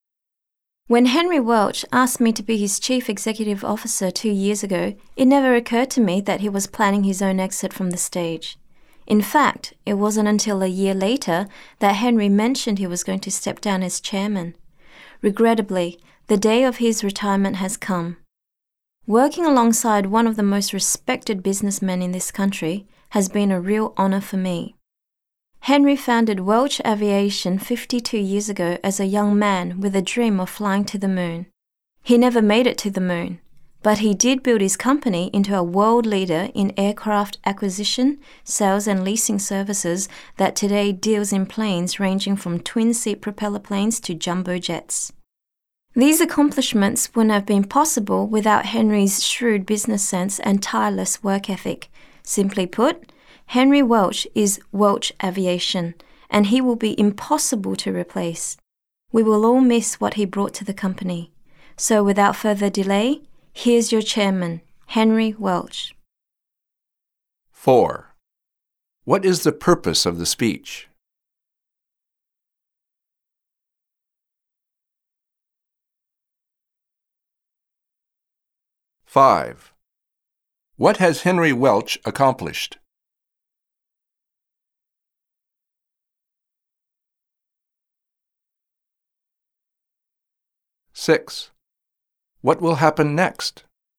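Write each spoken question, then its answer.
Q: What is the purpose of the speech?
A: To honor and introduce the retiring chairman, Henry Welch

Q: What has Henry Welch accomplished?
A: He built Welch Aviation into a world leader in aircraft acquisition, sales and leasing

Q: What will happen next?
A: Henry Welch will speak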